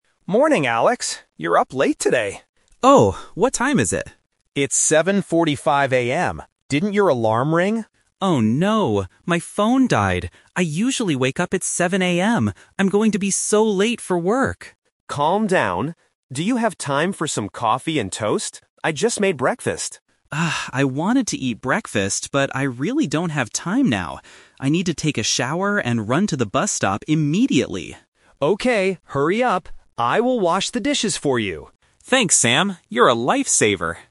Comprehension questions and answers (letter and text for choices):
Listen to the conversation and choose the correct answer (A, B, or C).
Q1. What time does Alex usually wake up?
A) 7:00 AM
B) 7:45 AM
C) 8:00 AM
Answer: A) 7:00 AM

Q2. Why didn't Alex's alarm ring this morning?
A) He forgot to set the alarm.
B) His phone battery died.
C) The alarm was too quiet.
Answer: B) His phone battery died.

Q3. What is Alex going to do next?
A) Eat some coffee and toast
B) Wash the dishes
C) Take a shower and go to the bus stop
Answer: C) Take a shower and go to the bus stop

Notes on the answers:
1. Alex clearly says, "I usually wake up at 7:00 AM." Option B (7:45 AM) is a trap because that is the time he woke up today (late), not his usual time. Option C is not mentioned.
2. Alex says, "Oh no! My phone died!" Option A is a plausible reason for an alarm not ringing, but it is not mentioned in the audio. Option C is not mentioned.
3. Alex says, "I need to take a shower and run to the bus stop immediately." Option A is a trap because he wanted to eat breakfast, but he doesn't have time. Option B is a trap because Sam will wash the dishes, not Alex.

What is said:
Sam: Morning, Alex. You're up late today.
Alex: Oh! What time is it?
Sam: It's 7:45 AM. Didn't your alarm ring?
Alex: Oh no! My phone died! I'm going to be so late for work.
Sam: Calm down. Do you have time for some coffee and toast? I just made breakfast.
Alex: Ah, I wanted to eat breakfast, but I really don't have time now. I need to take a shower and run to the bus stop immediately.
Sam: Okay, hurry up! I will wash the dishes for you.